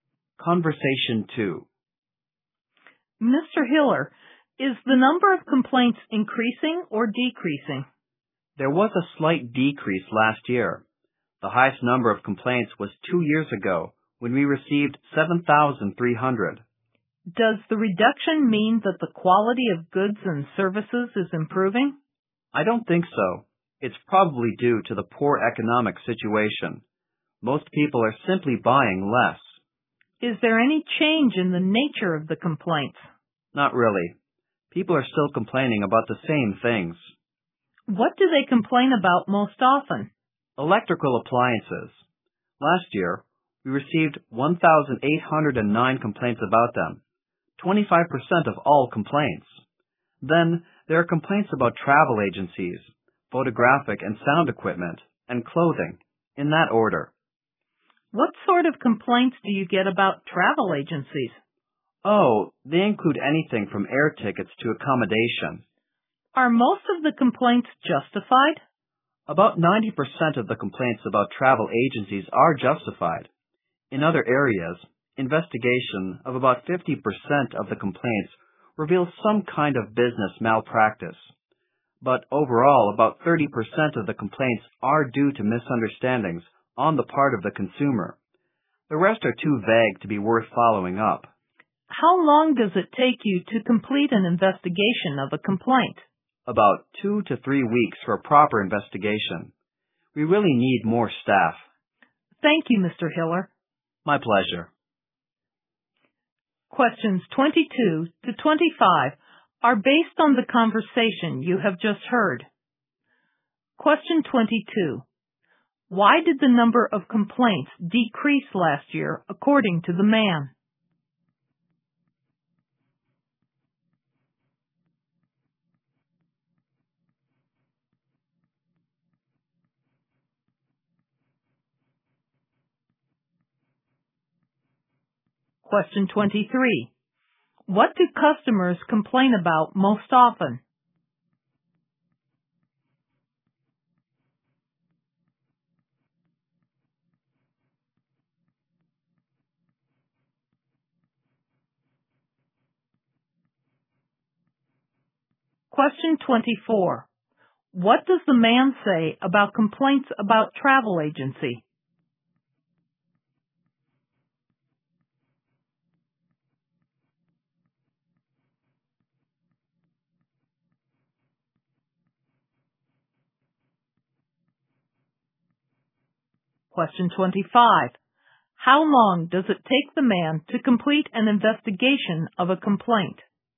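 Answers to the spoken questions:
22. Because of the poor economy; people are buying less.
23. Electrical appliances.
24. About 90% of them are justified.
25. About 2 to 3 weeks.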